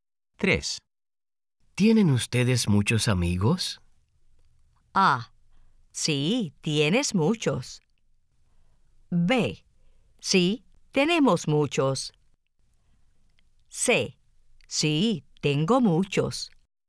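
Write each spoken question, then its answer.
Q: ¿Tienen ustedes muchos amigos?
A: B: Sí, tenemos muchos.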